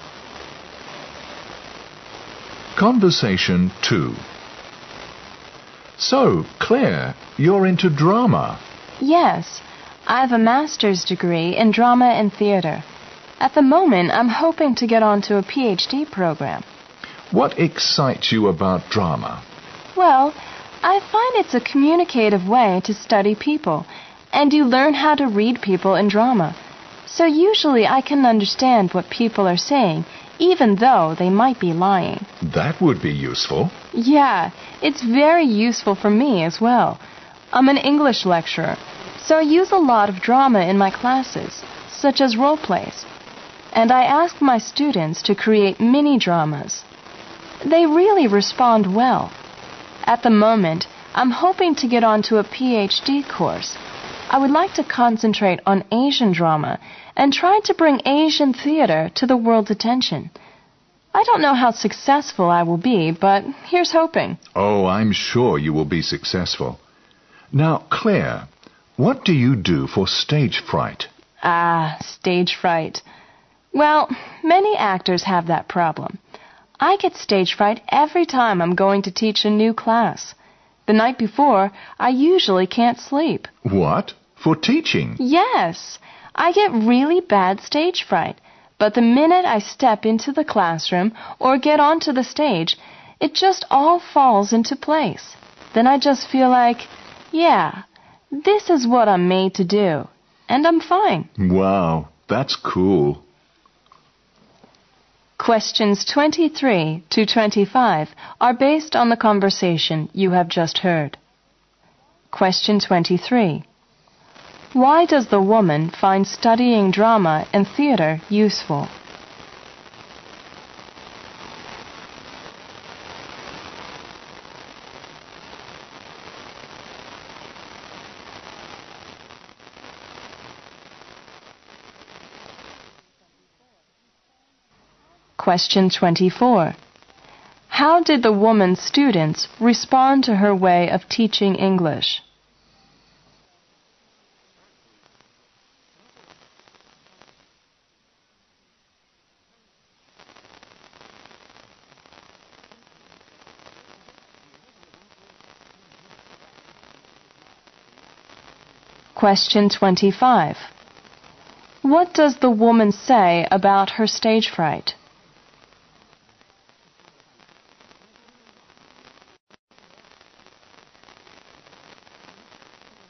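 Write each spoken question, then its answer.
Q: Why does the woman find studying drama and theater useful?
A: It teaches her how to read people

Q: How did the woman's students respond to her way of teaching English?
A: They responded well

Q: What does the woman say about her stage fright?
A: She gets it badly, but it goes away as soon as she enters the classroom or goes on stage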